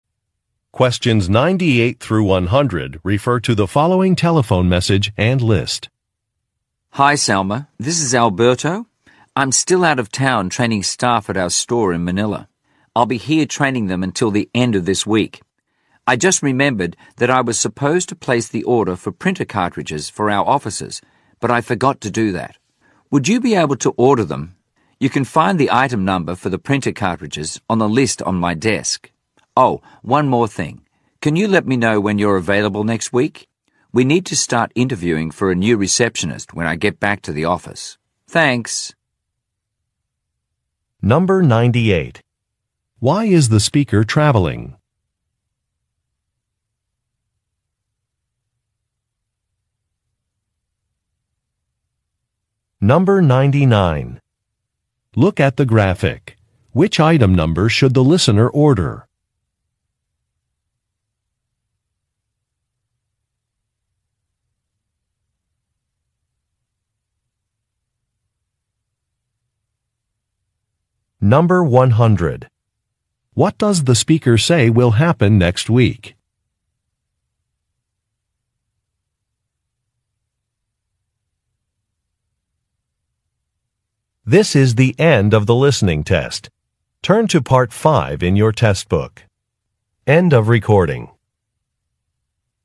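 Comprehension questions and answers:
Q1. Why is the speaker traveling?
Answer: He is conducting training.

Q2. What does the speaker say will happen next week?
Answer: Some job applicants will be interviewed.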